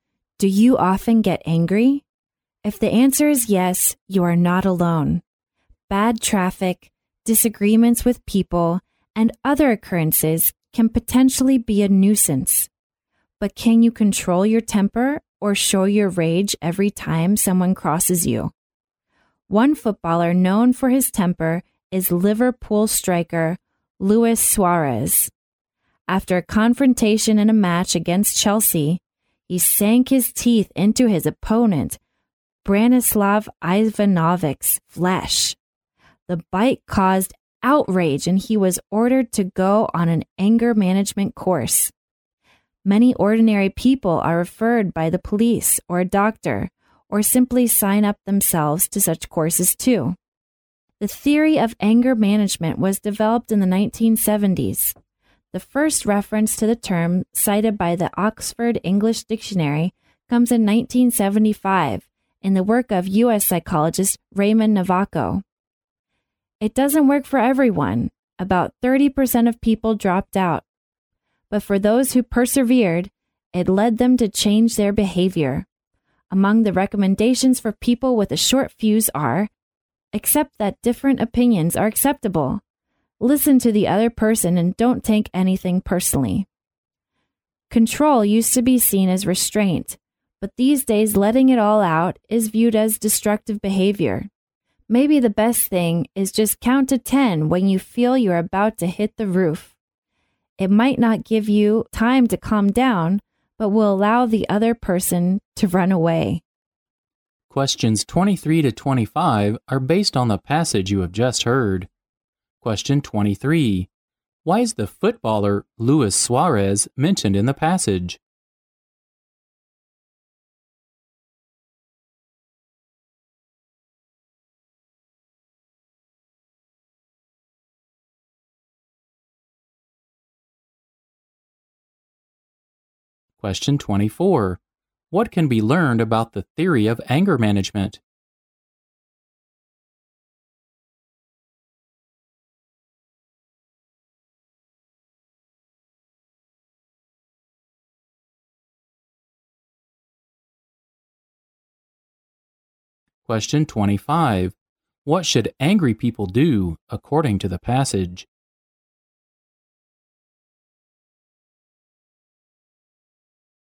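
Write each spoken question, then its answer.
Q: Why is the footballer Luis Suarez mentioned in the passage?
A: He is known for his temper and had to attend an anger management course after biting an opponent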